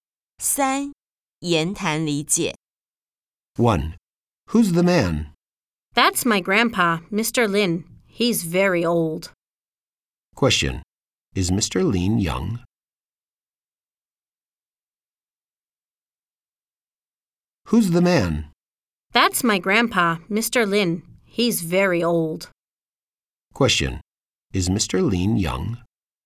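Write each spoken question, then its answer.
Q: Is Mr. Lin young?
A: No, he isn't. He's very old.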